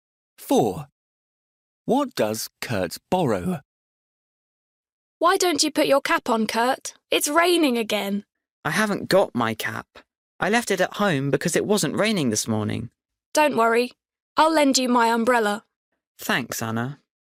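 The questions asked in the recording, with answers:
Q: What does Kurt borrow?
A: An umbrella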